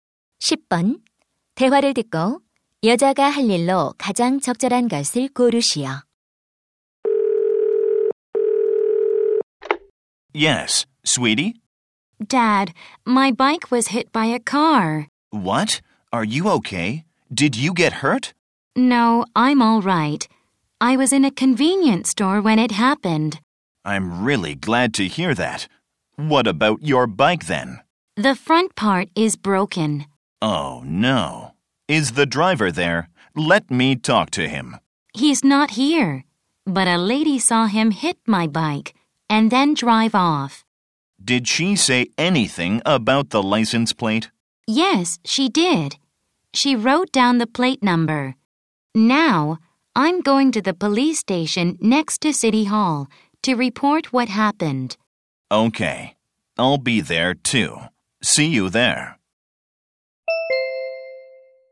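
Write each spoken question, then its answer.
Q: 대화를 듣고 여자가 할 일로 가장 적절한 것을 고르시오.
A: 경찰서에 가서 사고 신고하기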